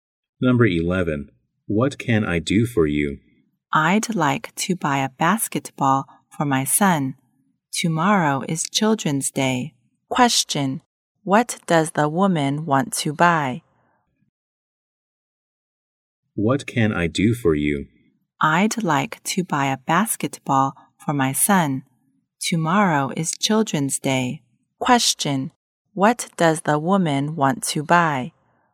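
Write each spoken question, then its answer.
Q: Question, what does the woman want to buy?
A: A basketball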